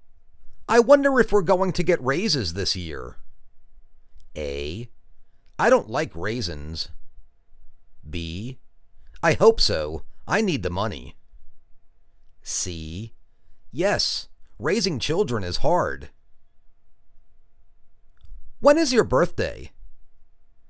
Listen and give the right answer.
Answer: I hope so, I need the money.